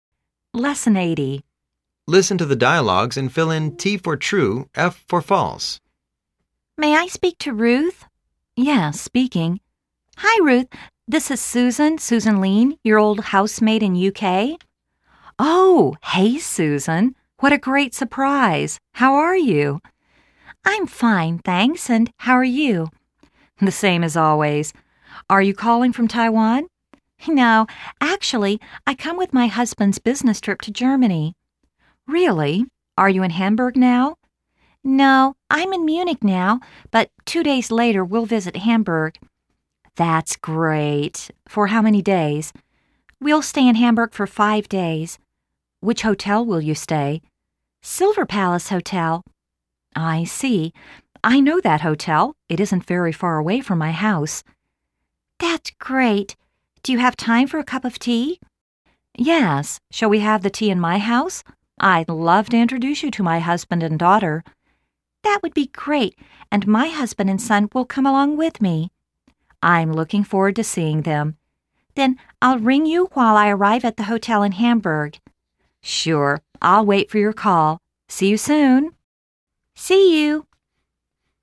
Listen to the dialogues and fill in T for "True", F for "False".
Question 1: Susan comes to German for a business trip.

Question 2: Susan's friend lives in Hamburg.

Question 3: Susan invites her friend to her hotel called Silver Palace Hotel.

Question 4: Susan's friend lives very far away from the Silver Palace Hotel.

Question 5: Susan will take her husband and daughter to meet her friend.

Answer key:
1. F
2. T
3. F
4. F
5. F